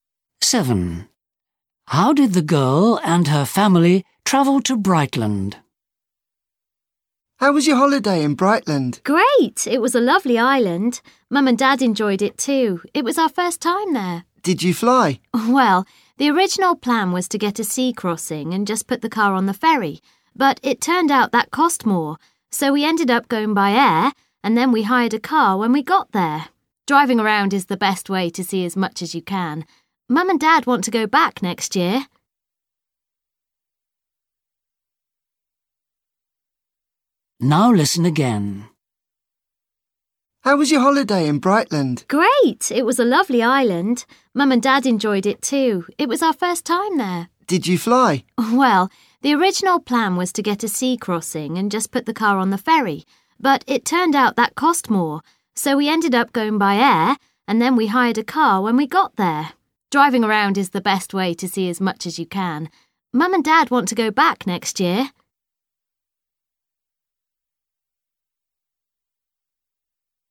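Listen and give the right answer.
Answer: By plane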